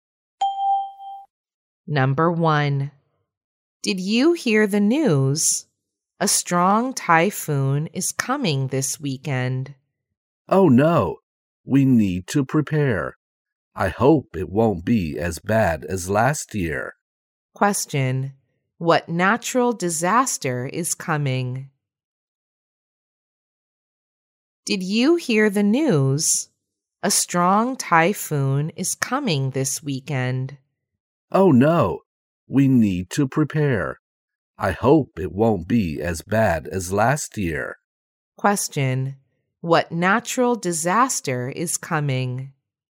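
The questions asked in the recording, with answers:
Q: What natural disaster is coming?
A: A strong typhoon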